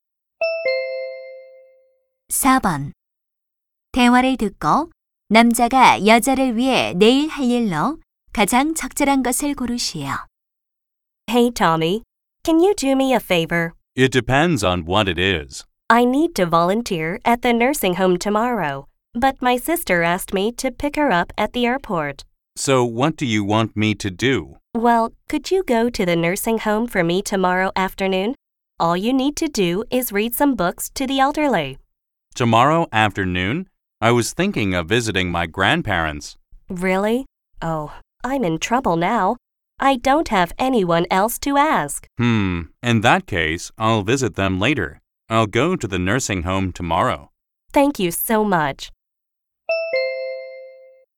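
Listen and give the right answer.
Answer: 양로원에서 봉사하기 (노인들에게 책 읽어 주기)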